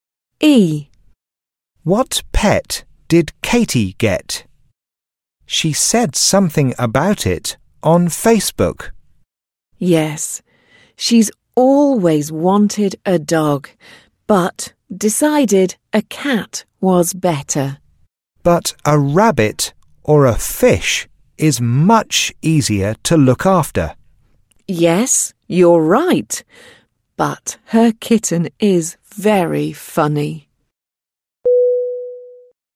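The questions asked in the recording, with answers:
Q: What pet did Katie get? She said something about it on Facebook.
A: A cat (a kitten)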